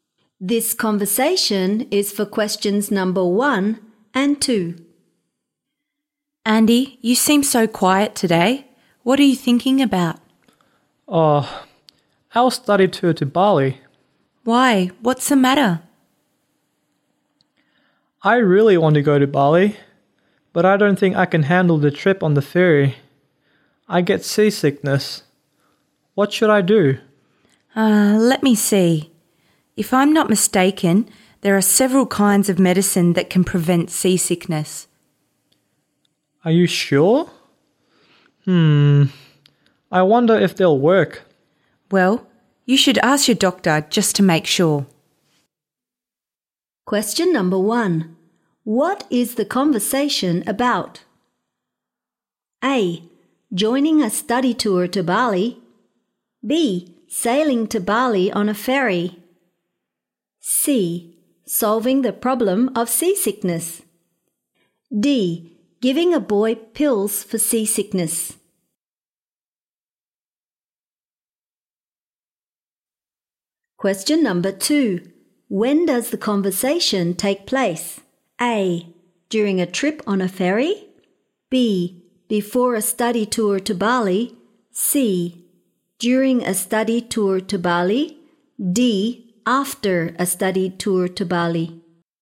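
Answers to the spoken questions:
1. C: Solving the problem of seasickness.
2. B: Before a study tour to Bali.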